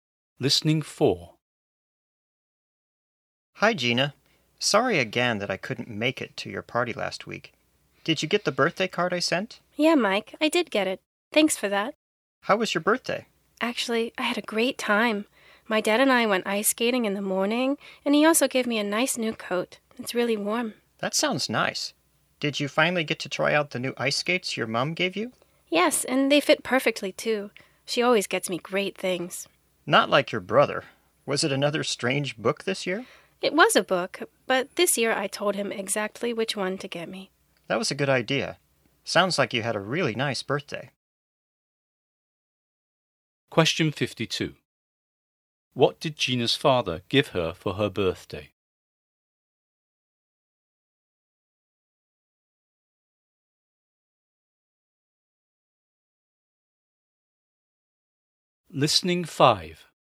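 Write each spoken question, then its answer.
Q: What did Gina's father give her for her birthday?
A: A new coat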